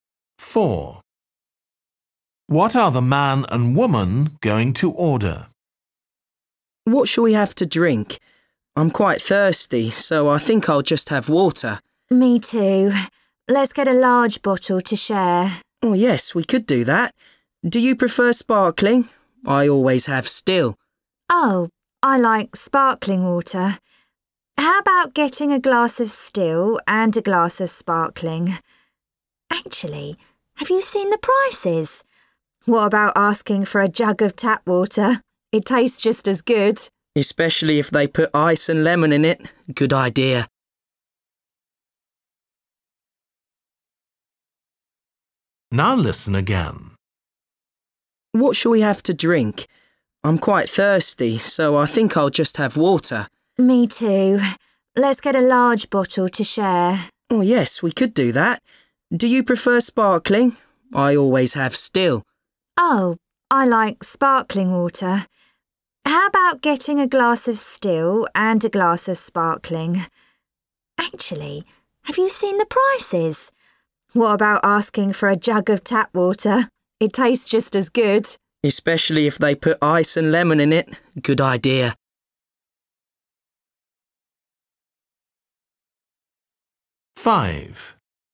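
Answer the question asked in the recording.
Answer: a jug of tap water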